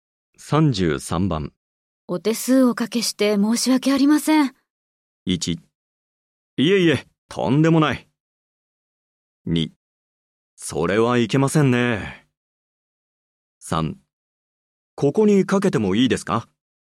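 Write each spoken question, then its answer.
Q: お手数おかけして申し訳ありません。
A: 1: いえいえ、とんでもない。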